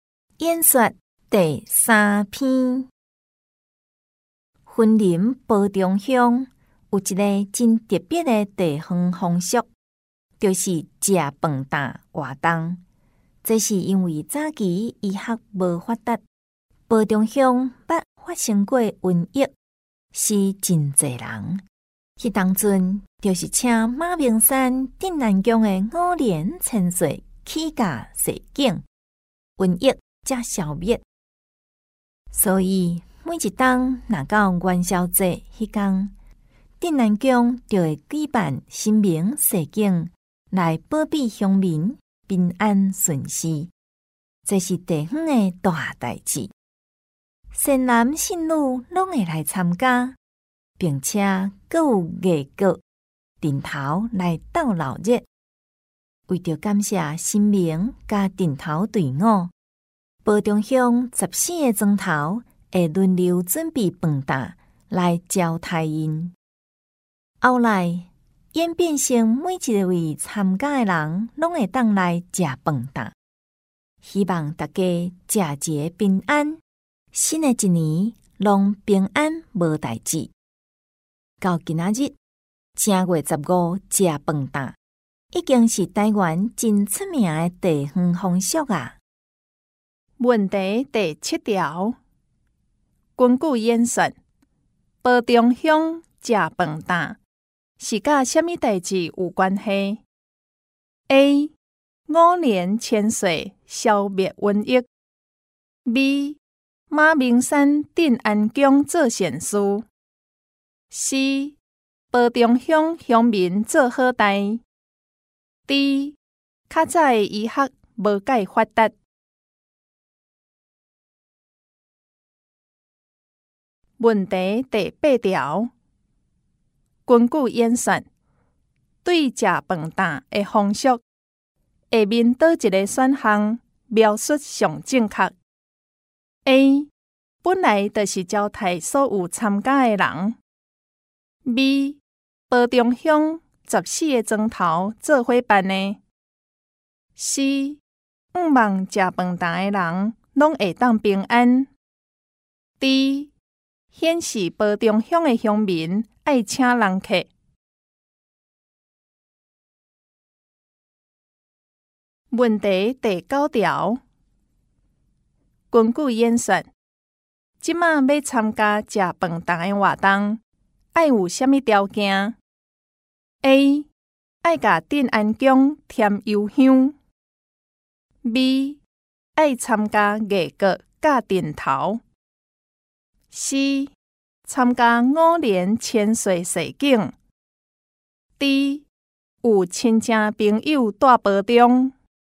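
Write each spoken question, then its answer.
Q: 根据演说,保中乡吃饭打是跟什么代志有关系 ?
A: A: 五年千岁消灭瘟疫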